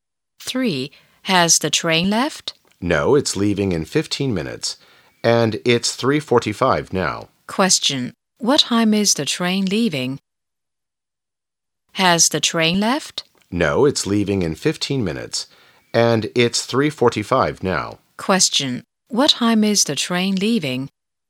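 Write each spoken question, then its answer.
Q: Question. What time is the train leaving?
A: At 4:00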